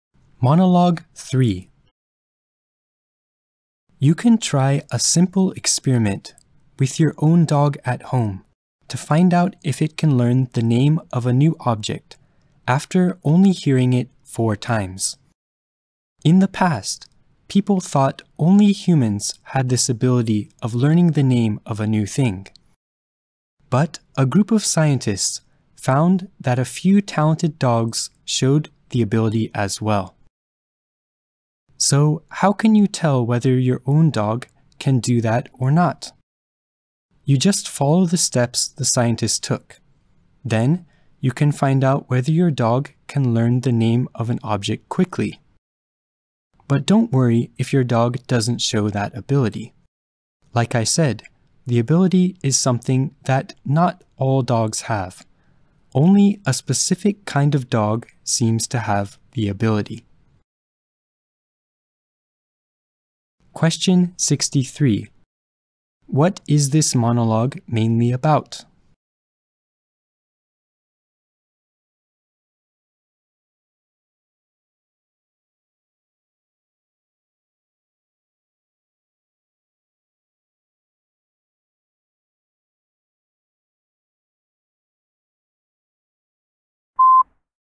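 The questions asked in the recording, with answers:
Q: What is this monologue mainly about?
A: A simple experiment to find out if your dog can quickly learn the name of a new object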